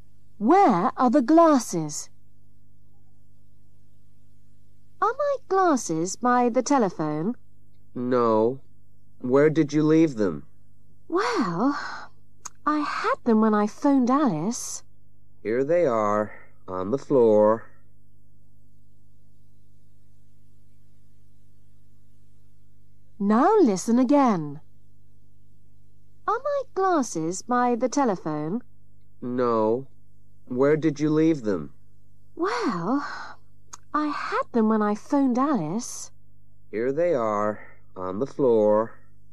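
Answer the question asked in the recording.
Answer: On the floor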